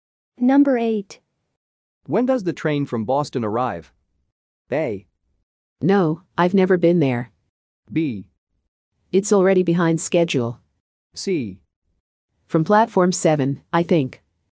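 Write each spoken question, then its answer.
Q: When does the train from Boston arrive?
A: B: It's already behind schedule.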